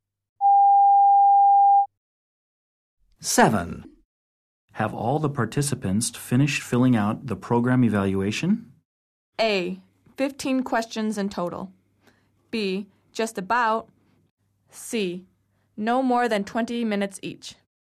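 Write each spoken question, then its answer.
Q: Have all the participants finished filling out the program evaluation?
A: B: Just about.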